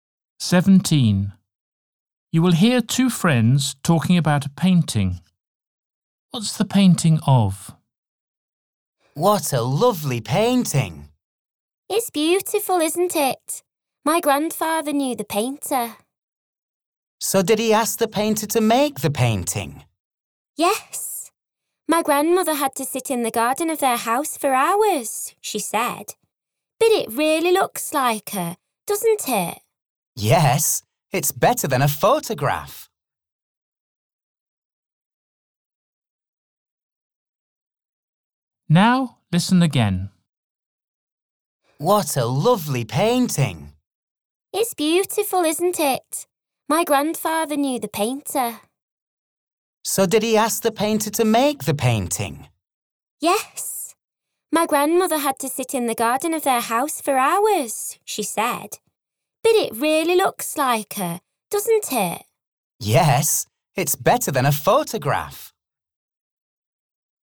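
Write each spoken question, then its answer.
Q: What's the painting of?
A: The speaker's grandmother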